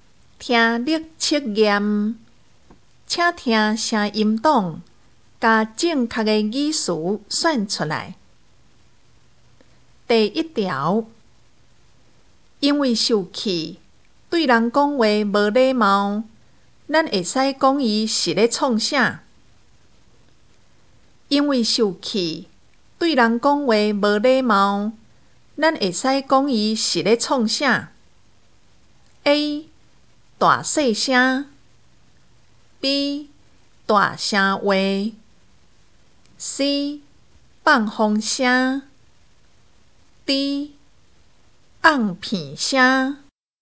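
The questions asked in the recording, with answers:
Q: 因为受气,对人讲话无礼貌,咱会使讲伊是咧创啥?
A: B: 大声话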